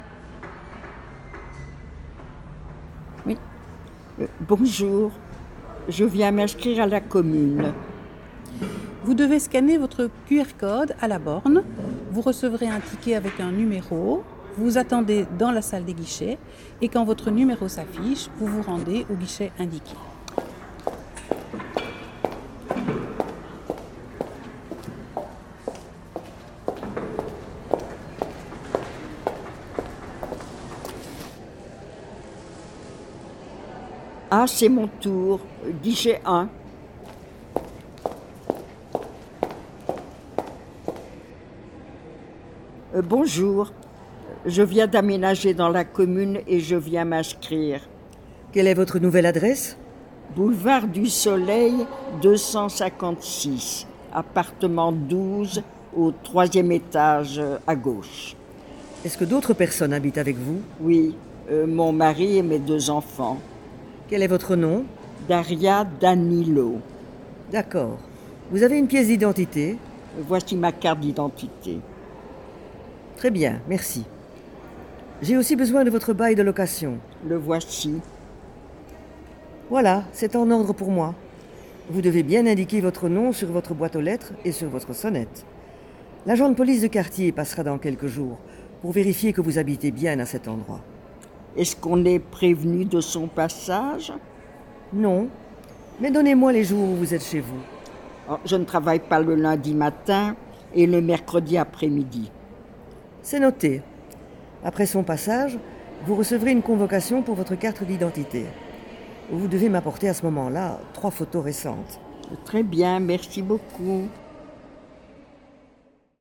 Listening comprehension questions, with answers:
IV. Lors de la 4e écoute, les As relèvent les formulations utilisées par Mme Darya Danilo pour entrer en contact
les As relèvent les formulations utilisées par Mme Darya Danilo pour entrer en contact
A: Bonjour, je viens m'inscrire à la commune – Bonjour, je viens d'emménager dans la commune et je viens m'inscrire.

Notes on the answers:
L'enseignant attire l'attention des As sur le terme « convocation » qui indique le caractère obligatoire de l'invitation à se rendre dans un endroit.